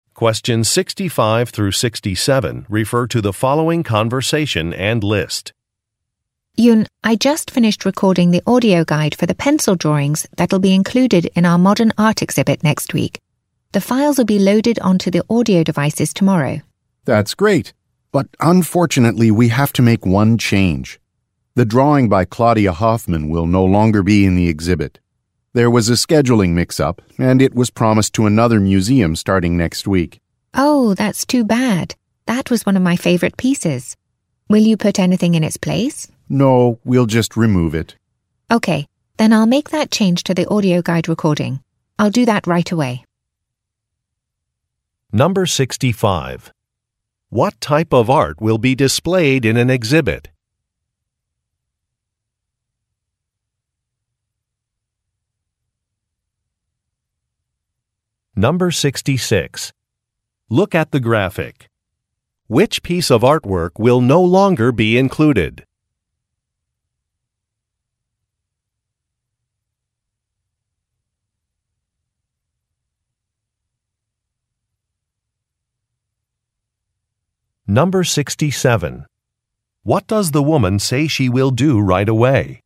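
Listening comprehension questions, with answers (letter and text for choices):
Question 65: What type of art will be displayed in an exhibit?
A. Clay sculptures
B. Oil paintings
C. Black-and-white photographs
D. Pencil drawings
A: D. Pencil drawings

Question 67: What does the woman say she will do right away?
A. Speak with an artist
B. Edit a recording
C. Clean a gallery space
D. Greet some visitors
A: B. Edit a recording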